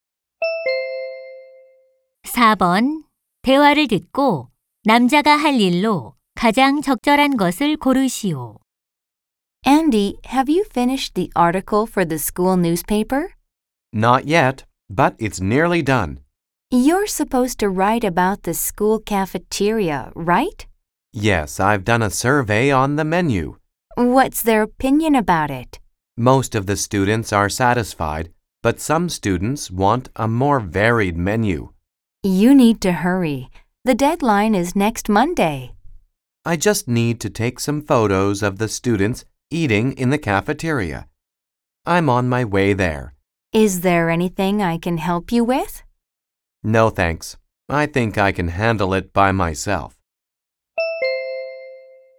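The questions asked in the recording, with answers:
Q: 대화를 듣고 남자가 할 일로 가장 적절한 것을 고르시오.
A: 구내식당에서 식사하는 학생들 사진 찍기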